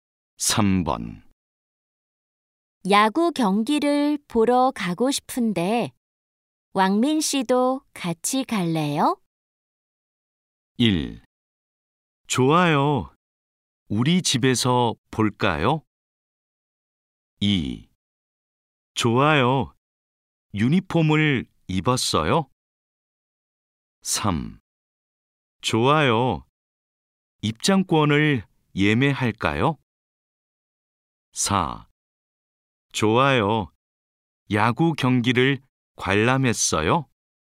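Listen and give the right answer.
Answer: 3: 좋아요. 입장권을 예매할까요?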